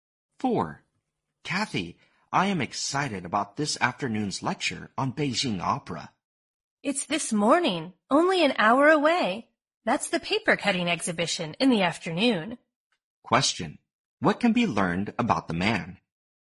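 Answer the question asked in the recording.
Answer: He got the time of the lecture wrong; it is this morning.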